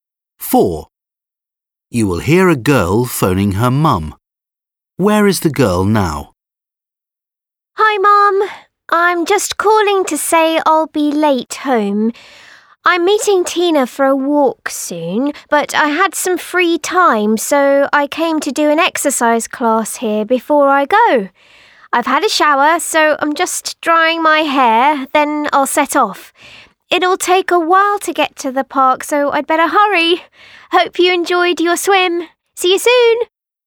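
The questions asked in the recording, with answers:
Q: Where is the girl now?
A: At a sports centre where she did an exercise class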